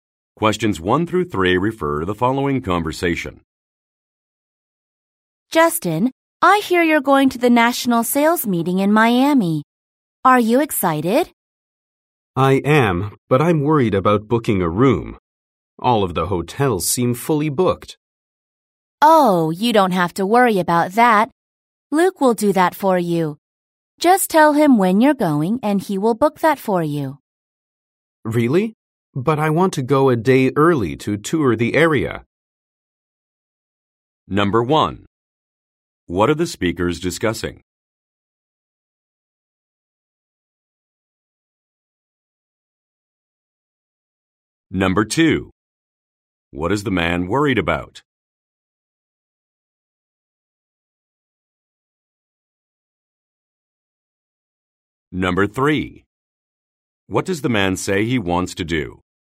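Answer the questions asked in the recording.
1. The national sales meeting in Miami
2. Booking a hotel room
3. Go a day early to tour the area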